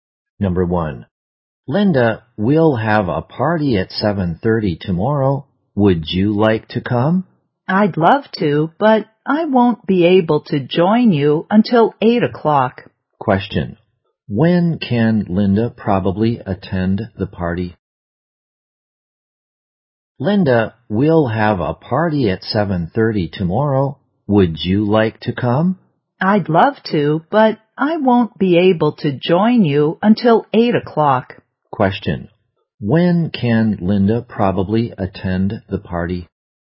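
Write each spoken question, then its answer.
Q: When can Linda probably attend the party?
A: At 8 o'clock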